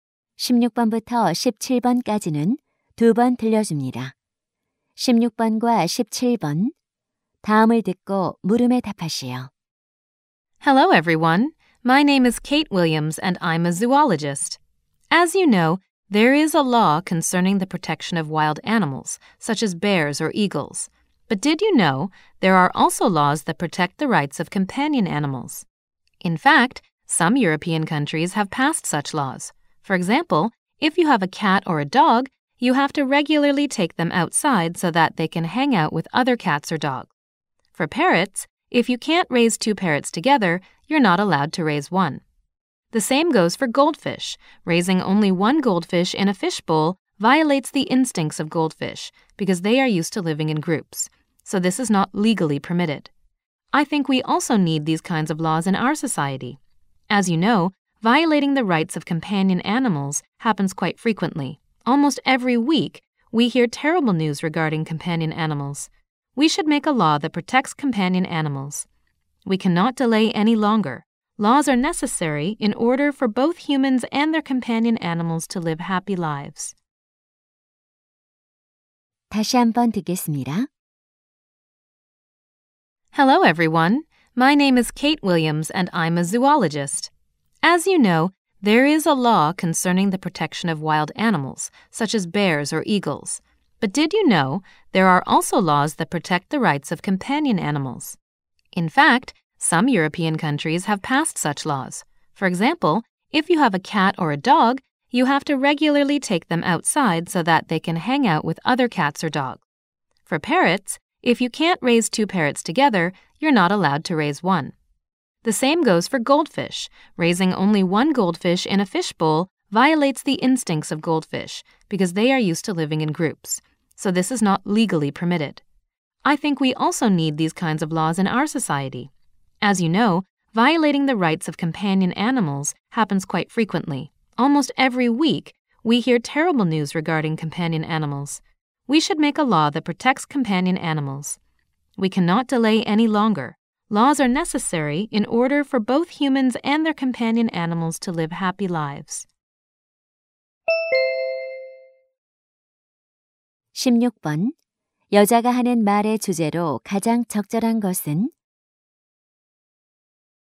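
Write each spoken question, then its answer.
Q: 여자가 하는 말의 주제로 가장 적절한 것은?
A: 반려동물의 권리를 보호하는 법의 필요성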